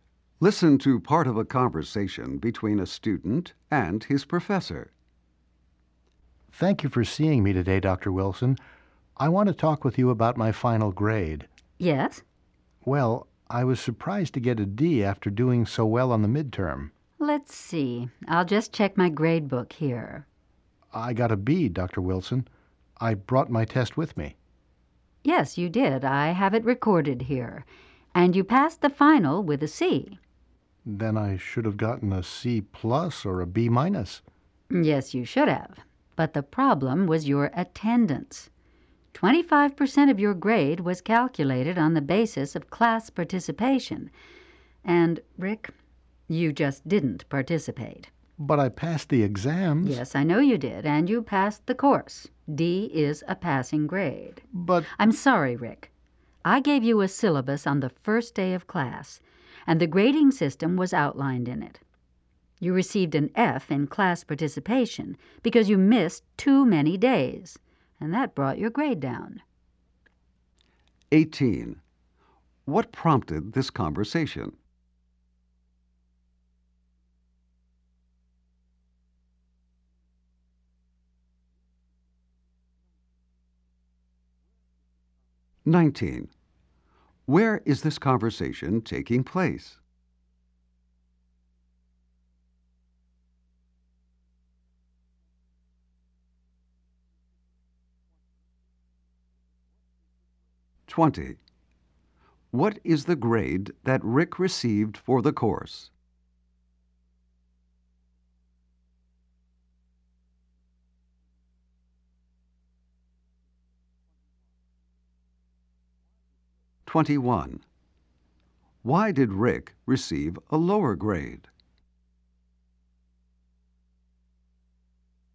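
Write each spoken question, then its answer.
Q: What prompted this conversation?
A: Rick was surprised by his final grade of D

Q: Why did Rick receive a lower grade?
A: He missed too many classes, so he failed class participation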